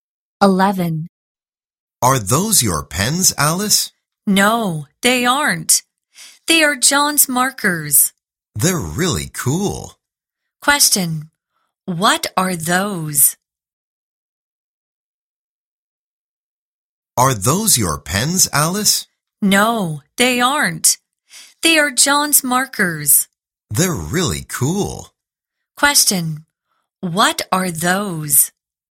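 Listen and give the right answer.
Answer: John's markers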